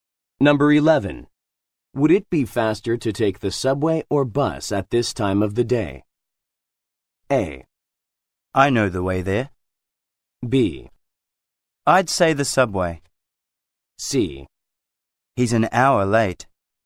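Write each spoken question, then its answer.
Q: Would it be faster to take the subway or bus at this time of the day?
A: B: I'd say the subway.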